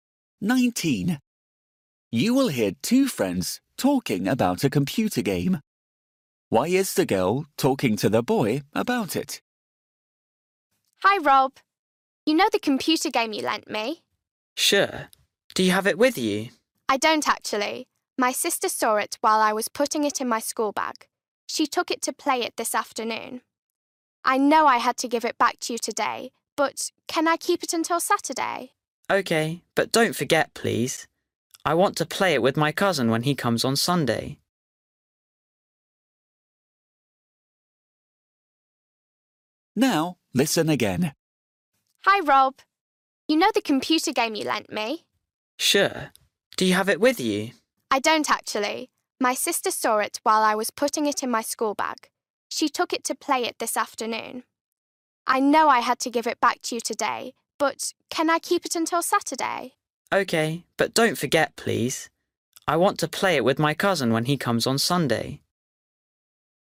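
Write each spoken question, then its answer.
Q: Why is the girl talking to the boy about it?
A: to ask if she can keep the game until Saturday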